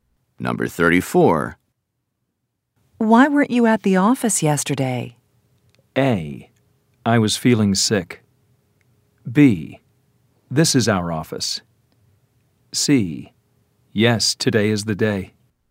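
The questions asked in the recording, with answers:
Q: Why weren't you at the office yesterday?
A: A: I was feeling sick.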